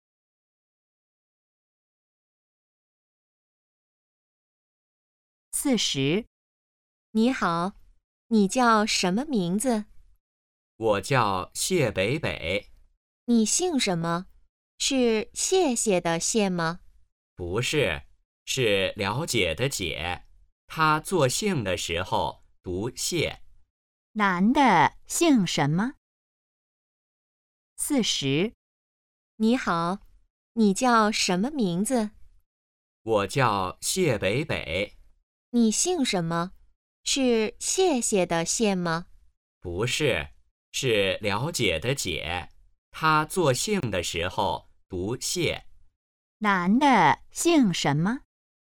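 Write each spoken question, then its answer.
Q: 男的姓什么?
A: 解(读xiè)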